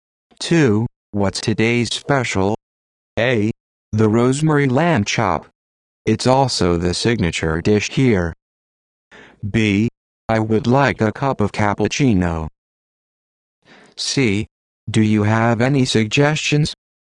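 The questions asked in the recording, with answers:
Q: What's today's special?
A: A: The rosemary lamb chop. It's also the signature dish here.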